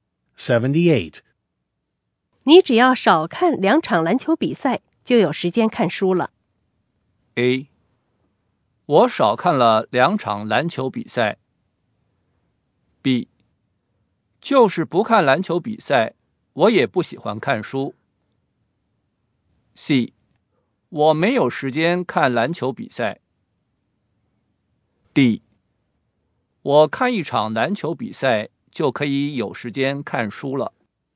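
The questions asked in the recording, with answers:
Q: 你只要少看两场篮球比赛,就有时间看书了。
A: B: 就是不看篮球比赛,我也不喜欢看书。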